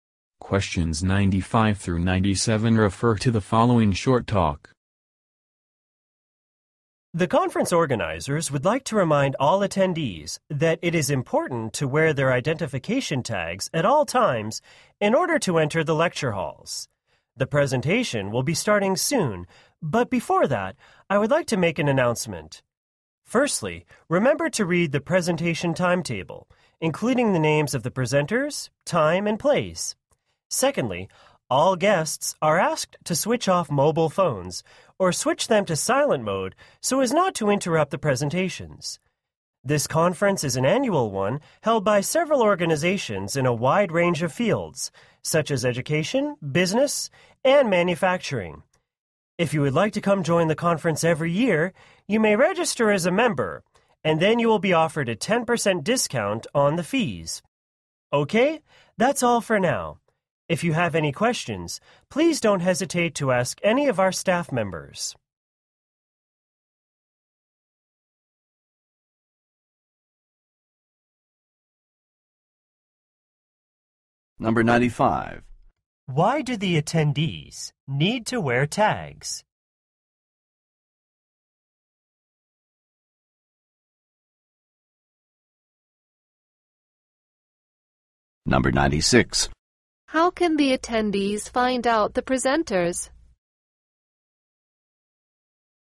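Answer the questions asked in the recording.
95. To enter the lecture halls
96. By reading the presentation timetable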